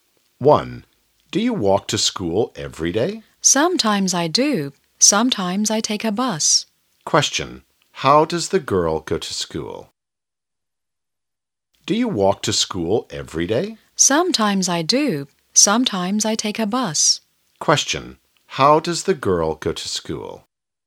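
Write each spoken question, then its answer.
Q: How does the girl go to school?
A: Sometimes on foot, sometimes by bus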